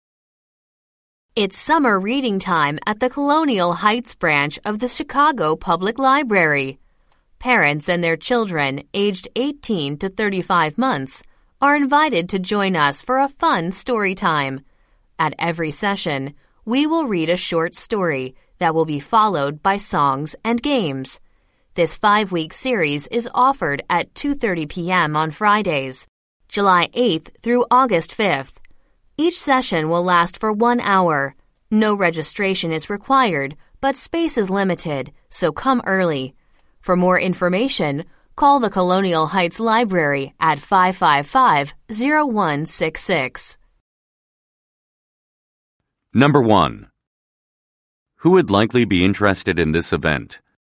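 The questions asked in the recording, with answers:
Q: Who would likely be interested in this event?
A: Parents of young children (18 to 35 months)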